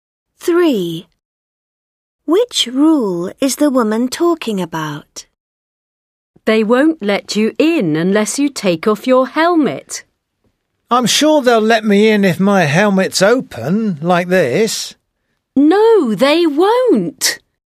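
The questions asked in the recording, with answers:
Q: Which rule is the woman talking about?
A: You must take off your helmet to go in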